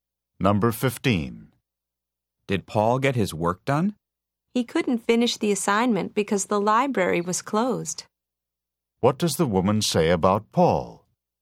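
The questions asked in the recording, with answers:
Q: What does the woman say about Paul?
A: He didn't finish because the library was closed.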